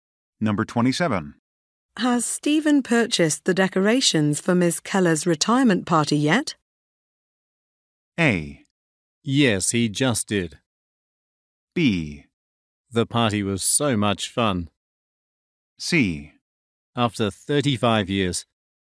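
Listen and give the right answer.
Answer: A: Yes, he just did.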